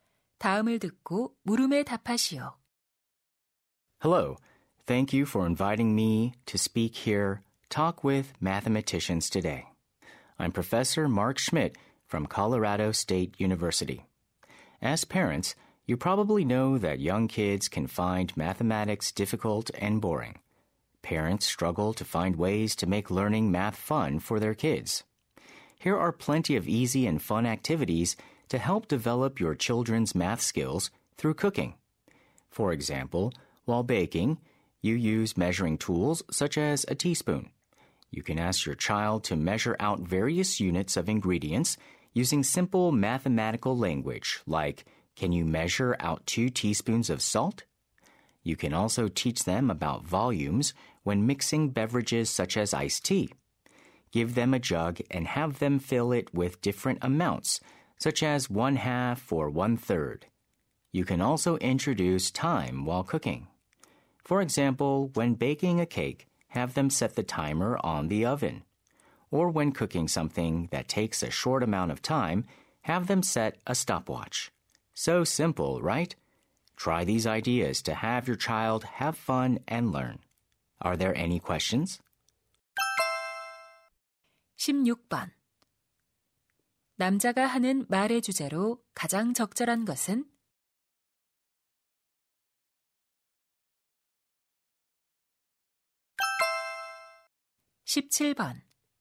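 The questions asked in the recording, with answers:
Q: 남자가 하는 말의 주제로 가장 적절한 것은?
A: 요리를 통해 아이들의 수학 능력을 기르는 방법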